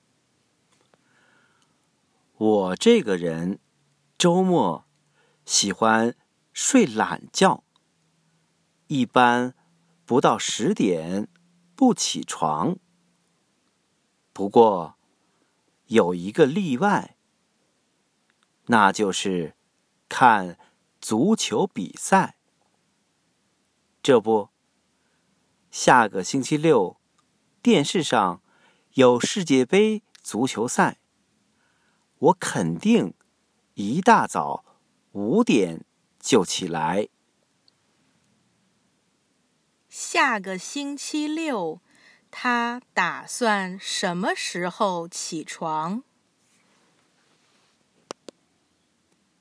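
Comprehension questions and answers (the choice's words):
Listen to the audio texts and questions, tick ONE correct answer to each question.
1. What time is he going to get up next Saturday?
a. 10:00am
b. 5:00am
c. 5:00pm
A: 5:00am

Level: Upper Intermediate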